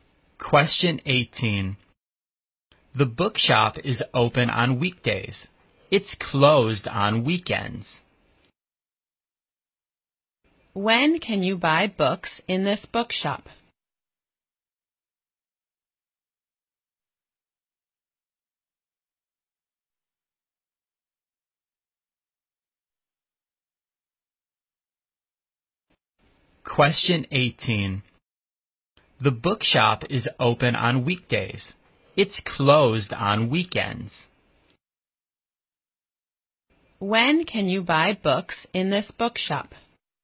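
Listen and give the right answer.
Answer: On weekdays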